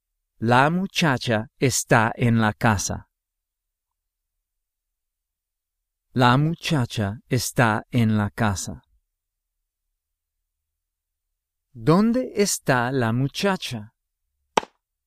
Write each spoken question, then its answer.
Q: ¿Dónde está la muchacha?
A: En la casa.